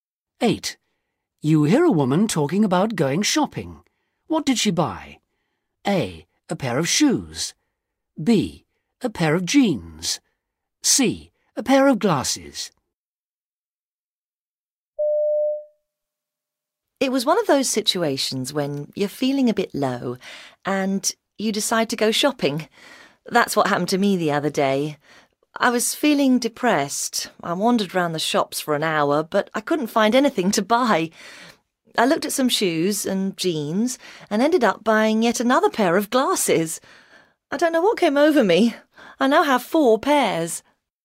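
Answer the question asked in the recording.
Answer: C: A pair of glasses.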